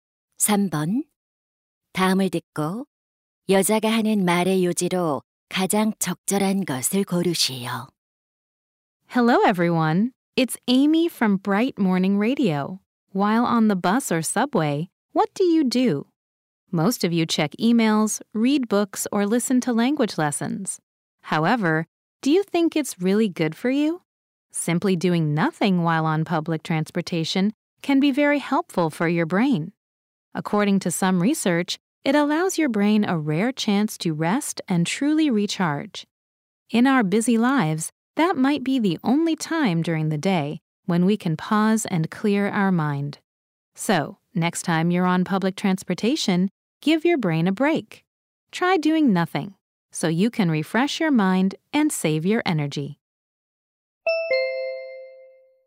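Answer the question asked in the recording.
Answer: 대중교통 이용 중 아무것도 하지 않는 것이 뇌의 휴식에 도움이 된다.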